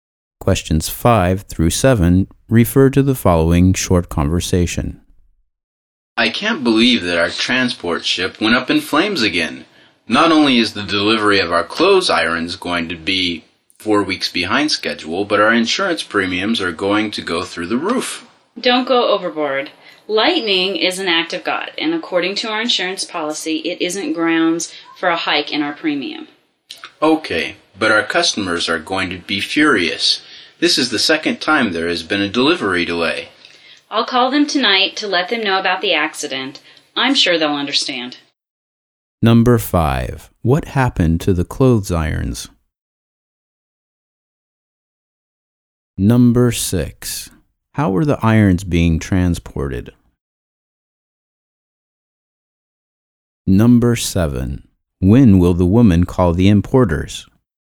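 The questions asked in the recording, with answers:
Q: What happened to the clothes irons?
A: The transport ship caught fire, so their delivery will be 4 weeks late

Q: How were the irons being transported?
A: By ship

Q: When will the woman call the importers?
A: Tonight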